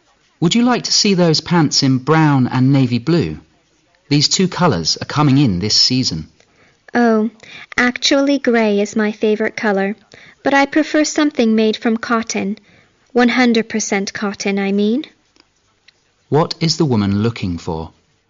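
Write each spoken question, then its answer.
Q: What is the woman looking for?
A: Grey pants made of 100% cotton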